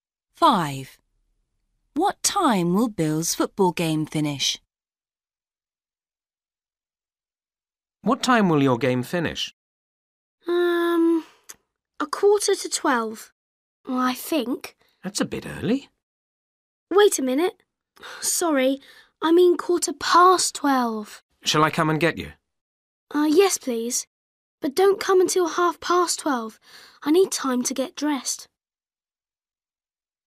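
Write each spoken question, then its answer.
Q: What time will Bill's football game finish?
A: 12:15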